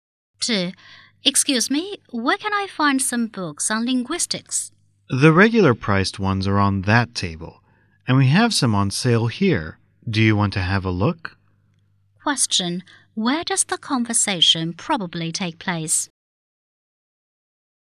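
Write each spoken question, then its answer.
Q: Where does the conversation probably take place?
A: In a bookstore.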